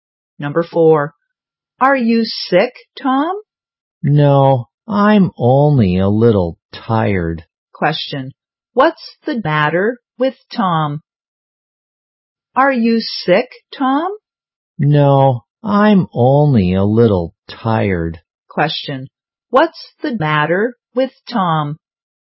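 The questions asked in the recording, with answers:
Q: what's the matter with Tom?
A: He's a little tired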